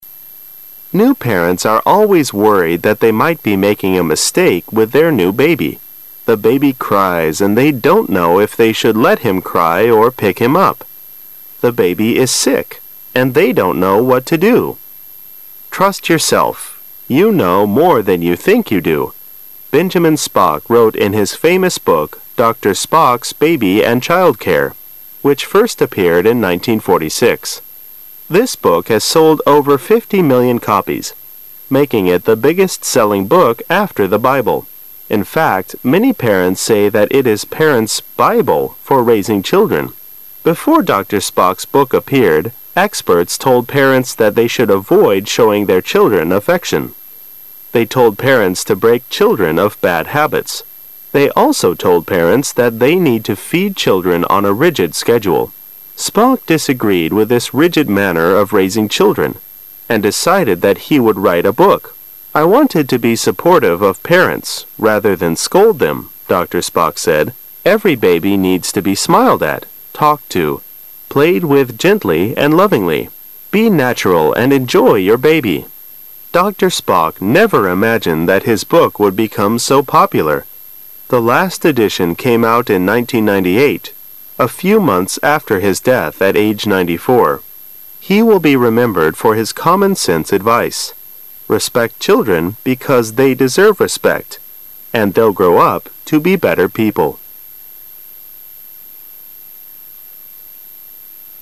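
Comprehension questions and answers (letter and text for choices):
Questions 17 - 20 are based on u talk about Dr. Benjamin Spock's book. You now have 20 seconds to read Questions 17- 20.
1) Which of the following statement about the book Dr. Spock's Baby and Child Care is true?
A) It sells as well as the Bible.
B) It is the second best seller after the Bible.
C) No one likes the book.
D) It has sold over 50 billion copies.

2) When was the book first published?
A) In 1994.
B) In 1964.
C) In 1946.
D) In 1998.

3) When the last edition of the book published, Dr. Spock was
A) happy.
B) popular.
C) dead.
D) old.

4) Which is the Dr. Spock's advice for raising children?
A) Parents should respect their children.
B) Parents should feed children on a rigid schedule.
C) Parents should break children of bad habits.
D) Parents should avoid showing their children affections.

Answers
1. B) It is the second best seller after the Bible.
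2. C) In 1946.
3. C) dead.
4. A) Parents should respect their children.

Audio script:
[解析] 17-20 New parents are always worried that they might be making a mistake with their new baby. The baby cries and they don't know if they should let him cry or pick him up. The baby is sick and they don't know what to do. "Trust yourself, you know more than you think you do. "Benjamin Spock wrote in his famous book Dr. Spock's Baby and Child Care, which first appeared in 1946. This book has sold over 50 million copies, making it the biggest selling .book after the Bible. In fact, many parents say that it is parents "Bible" for raising children. Before Dr. Spock's book appeared, experts told parents that they should avoid showing their children affections. They told parents to break, children of bad habits. They also told parents that they need to feed children on a rigid schedule. Spock disagreed with this rigid manner of raising children and decided that he would write a book. 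"I wanted to be supportive of parents rather than scold them. "Dr. Spock said, "every baby needs to be smiled at, talked to, played with gently and lovingly. Be natural and enjoy your baby. "Dr. Spock never imagined that his book would become so popular. The last edition came out in 1998, a few months after his death at age 94. He will be remembered for his common sense advice. Respect children because they deserve respect and they'll grow up to be better people.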